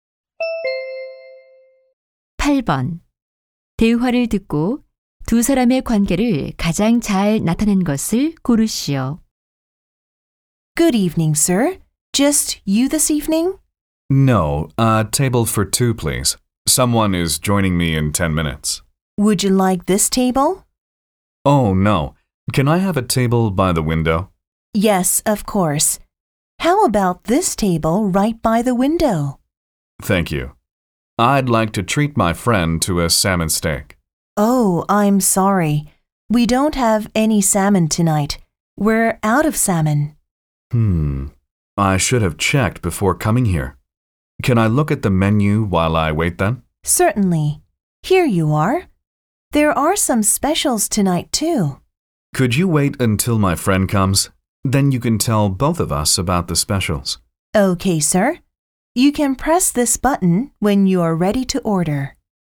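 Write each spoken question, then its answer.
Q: 대화를 듣고 두 사람의 관계를 가장 잘 나타낸 것을 고르시오.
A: 식당 종업원 - 손님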